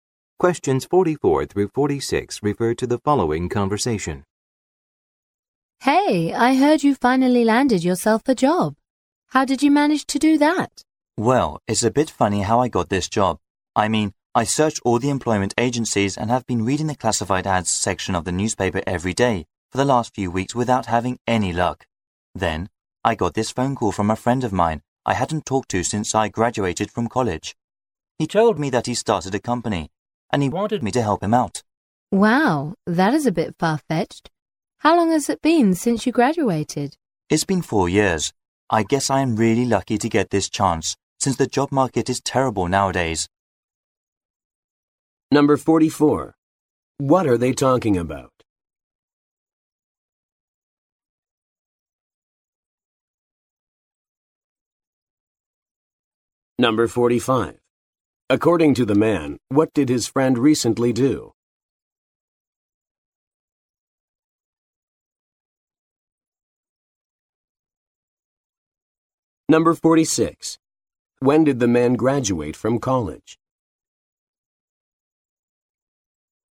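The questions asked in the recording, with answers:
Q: What are they talking about?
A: How the man got a new job

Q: According to the man, what did his friend recently do?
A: Started a company

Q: When did the man graduate from college?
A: Four years ago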